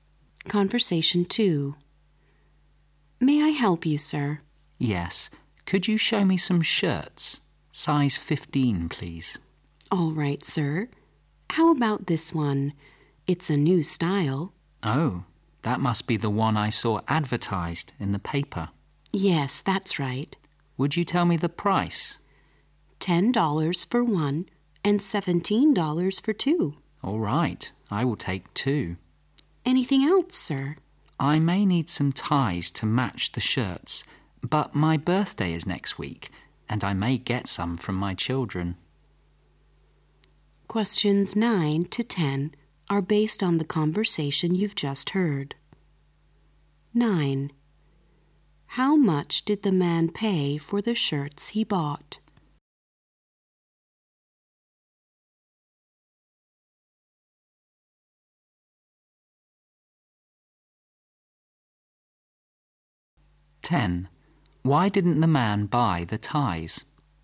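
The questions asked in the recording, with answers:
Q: How much did the man pay for the shirts he bought?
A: $17

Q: Why didn't the man buy the ties?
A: He may get some from his children for his birthday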